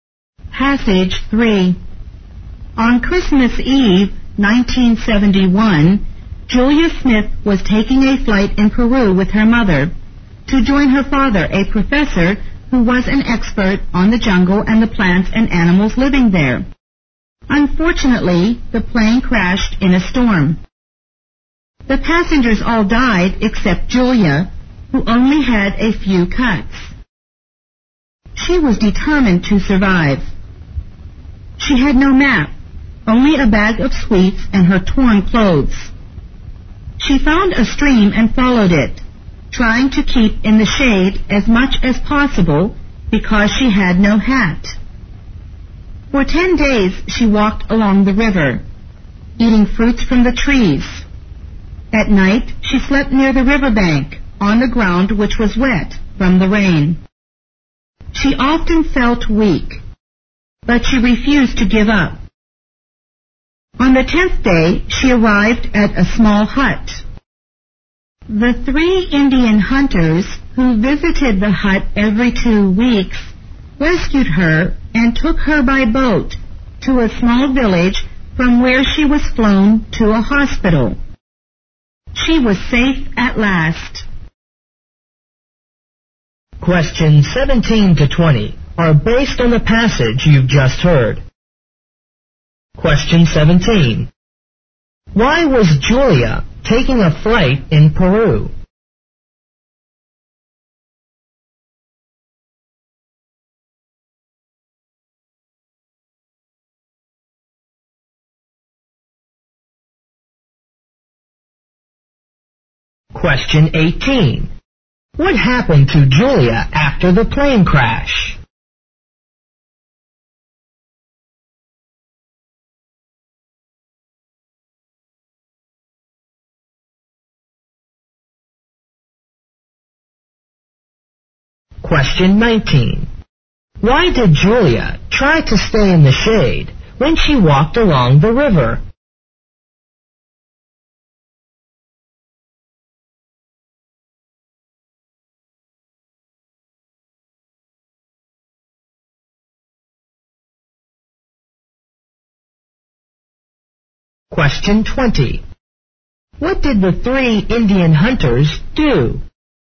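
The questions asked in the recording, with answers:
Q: Why was Julia taking a flight in Peru?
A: To join her father

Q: What happened to Julia after the plane crash?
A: She survived with only a few cuts

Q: Why did Julia try to stay in the shade when she walked along the river?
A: Because she had no hat

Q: What did the three Indian hunters do?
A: They rescued her and took her by boat to a village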